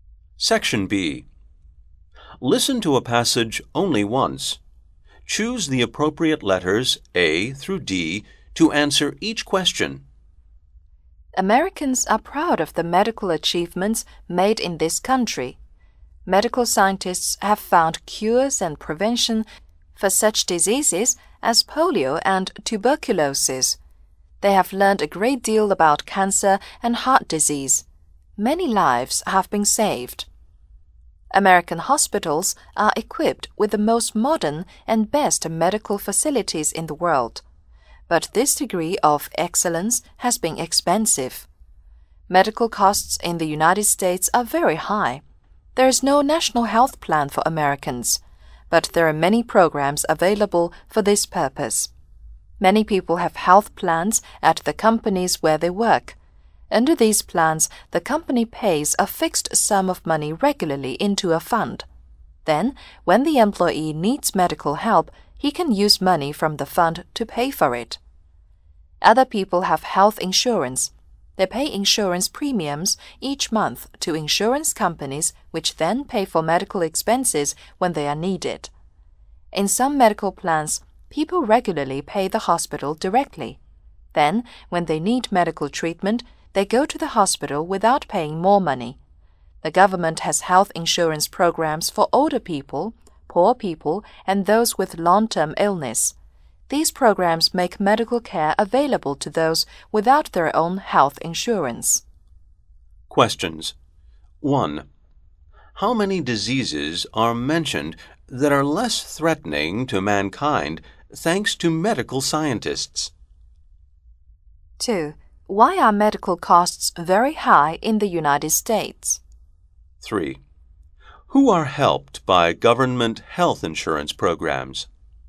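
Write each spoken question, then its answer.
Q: How many diseases are mentioned that are less threatening to mankind thanks to medical scientists?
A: Two (polio and tuberculosis)

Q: Why are medical costs very high in the United States?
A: Because of its excellent, most modern medical facilities

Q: Who are helped by government health insurance programs?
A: Older people, poor people and those with long-term illness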